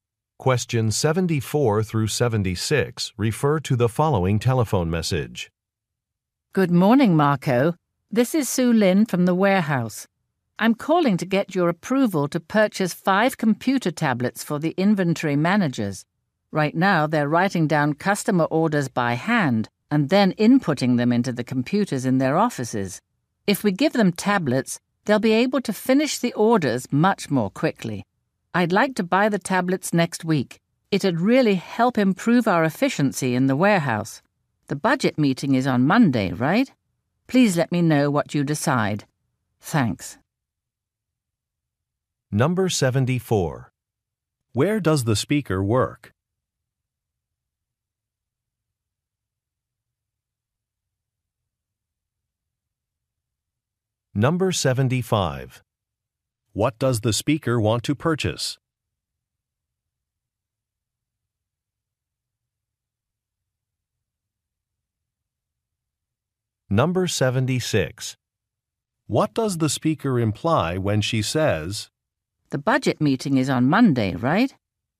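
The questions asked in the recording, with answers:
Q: Where does the speaker work?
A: At a warehouse

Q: What does the speaker want to purchase?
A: Computer tablets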